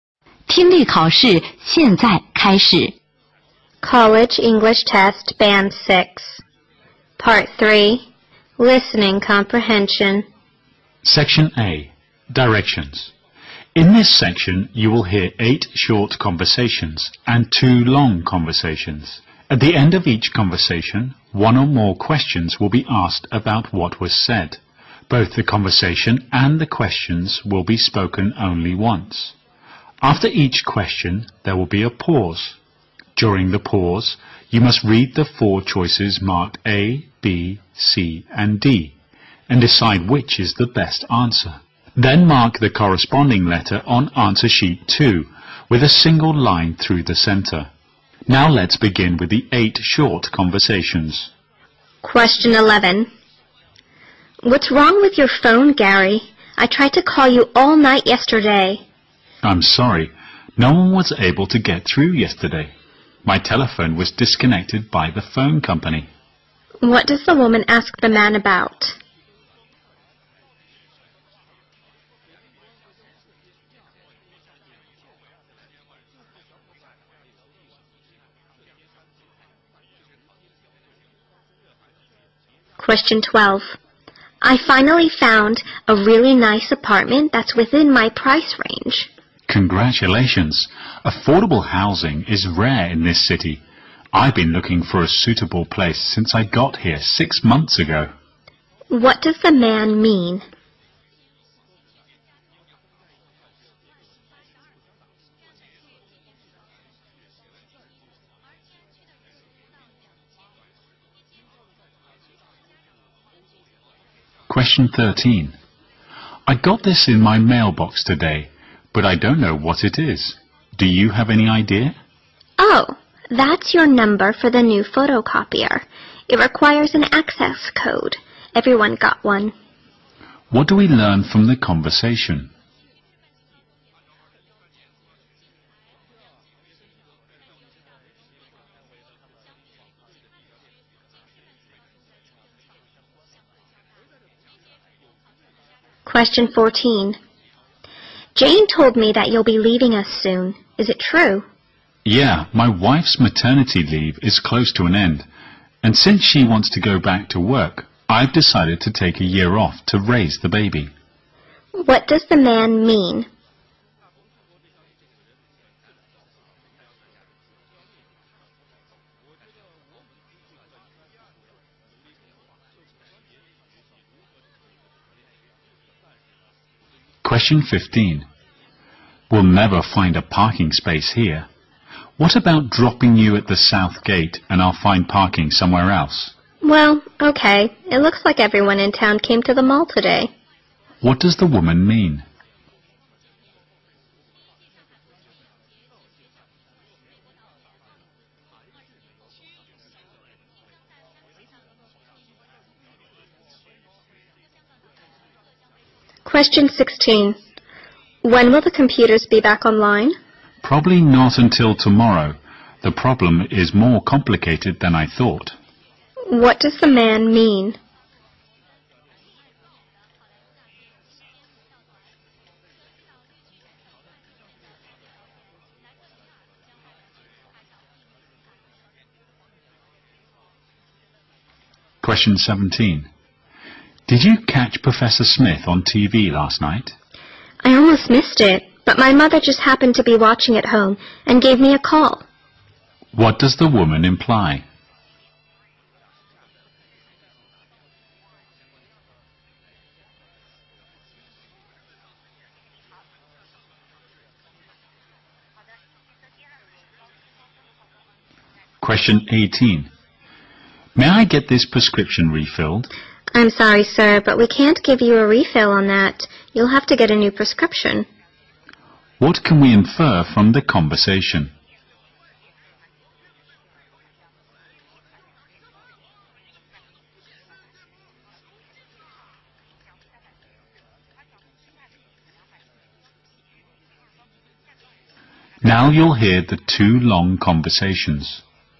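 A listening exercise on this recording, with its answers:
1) What does the woman ask the man about?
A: Why she couldn't reach him by phone last night.

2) What do we learn from the conversation?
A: The new photocopier requires an access code, and everyone got one.

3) What does the woman mean?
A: She agrees to be dropped at the south gate because the mall is crowded.

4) What does the woman imply?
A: She watched the programme because her mother called her.

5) What can we infer from the conversation?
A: The man needs a new prescription; it can't be refilled.

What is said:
At the end of each conversation, one or more questions will be asked about what was said. Both the conversation and the questions will be spoken only once. After each question there will be a pause. During the pause, you must read the four choices marked A), B), C) and D), and decide which is the best answer. Then mark the corresponding letter on Answer Sheet 2 with a single line through the centre.
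W: What's wrong with your phone, Gary? I tried to call you all night yesterday.
M: I'm sorry. No one's able to get through yesterday. My telephone was disconnected by the phone company.
Q: What does the woman ask the man about?
W: I finally found a really nice apartment that's within my price range.
M: Congratulations! Affordable housing is rare in this city. I've been looking for a suitable place since I got here six months ago.
Q: What does the man mean?
M: I got this in my mailbox today, but I don't know what it is. Do you have any idea?
W: Oh, that's your number for the new photocopier. It acquires an access code. Everyone got one.
Q: What do we learn from the conversation?
W: Jane told me that you'll be leaving at soon. Is it true?
M: Yeah, my wife's maternity leave is close to an end. And since she wants to go back to work, I've decided to take a year off to raise the baby.
M: We'll never find a parking space here. 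What about dropping you at thesouth gate and I'll find parking somewhere else.
W: Well, OK. It looks like everyone in town came to the mall today.
W: When will the computers be back online?
M: Probably not until tomorrow. The problem is more complicated than I thought.
M: Did you catch Professor Smith on TV last night?
W: I almost missed it, but my mother just happened to be watching at home and gave me a call.
M: May I get this prescription refilled?
W: I'm sorry, sir, but we can't give you a refill on that. You'll have to get a new prescription.
Q: What can we infer from the conversation?
Conversation One

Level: 六级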